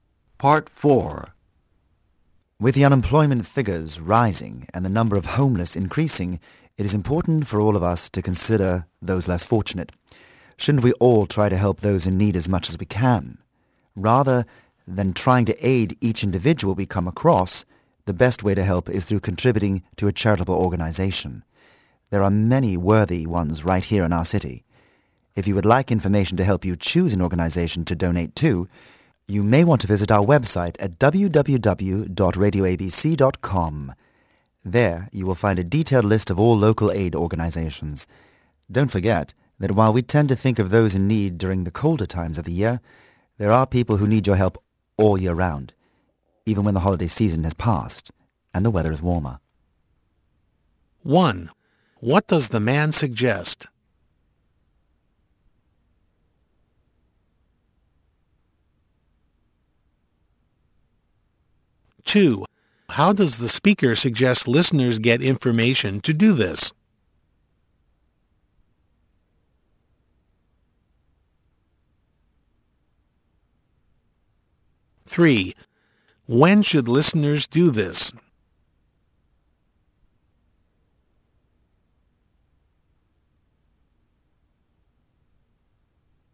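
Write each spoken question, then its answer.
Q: What does the man suggest?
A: Contributing to a charitable organization

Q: How does the speaker suggest listeners get information to do this?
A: By visiting the website www.radioabc.com

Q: When should listeners do this?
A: All year round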